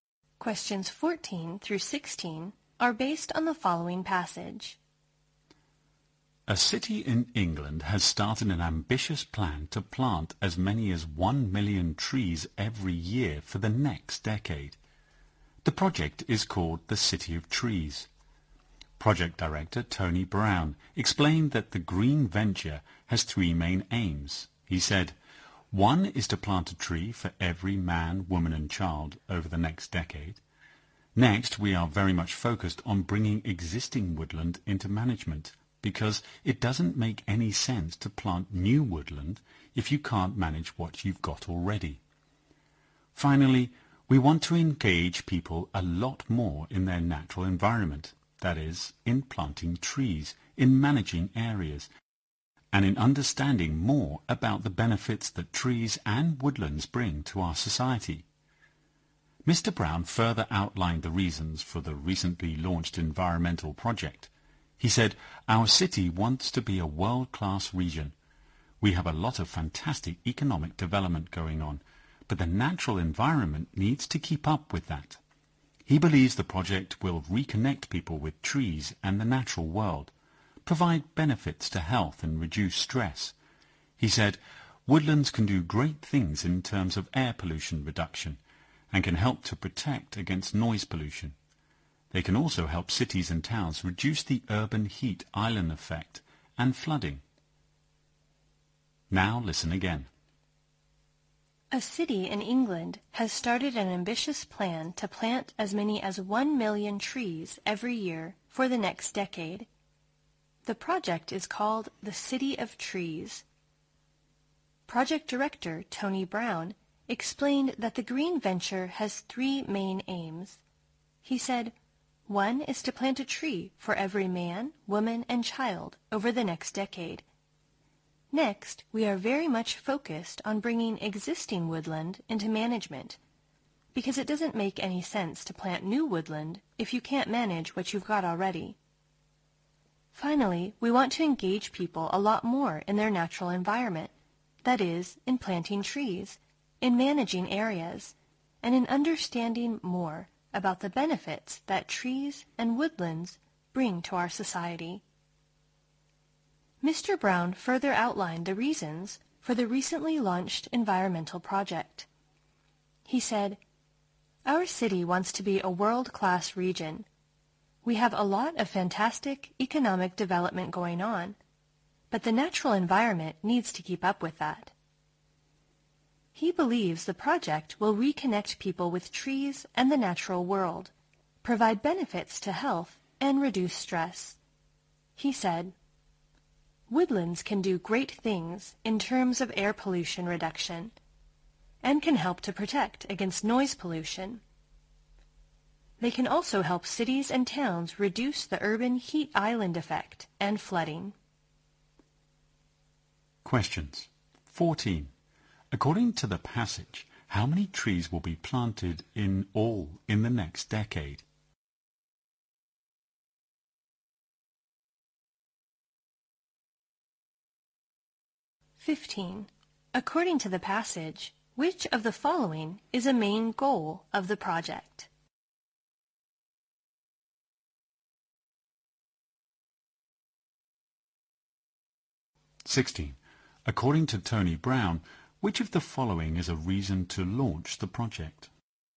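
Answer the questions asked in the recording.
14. 10 million
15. Planting a tree for every person / managing existing woodland / engaging people with nature
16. The city wants to be a world-class region, so the environment must keep up with economic development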